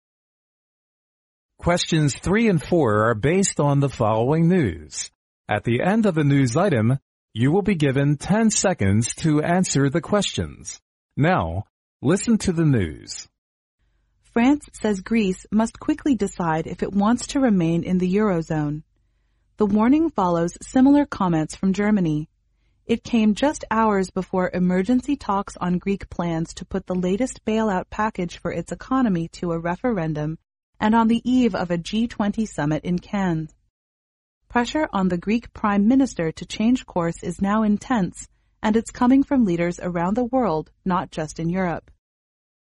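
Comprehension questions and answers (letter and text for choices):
Now listen to the news.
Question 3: What do France and Germany ask Greece to quickly decide?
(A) Whether it wants to follow similar comments.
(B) Whether it wants to remain in the Eurozone.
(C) Whether it wants to come before the emergency talks.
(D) Whether it wants to start the latest bailout package.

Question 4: According to the news item,what did Greece plan to do?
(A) Put the latest bailout package for its economy to a referendum.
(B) Change course due to the pressure from France and Germany.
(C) Come on the eve of a G20 summit in Cannes.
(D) Talk with leaders around the world not just in Europe.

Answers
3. (B) Whether it wants to remain in the Eurozone.
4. (A) Put the latest bailout package for its economy to a referendum.

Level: 英语专业四级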